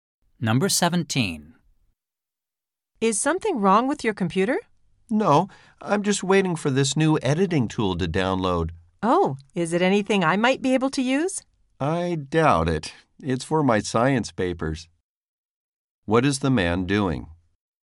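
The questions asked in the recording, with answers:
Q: What is the man doing?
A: Waiting for an editing tool to download.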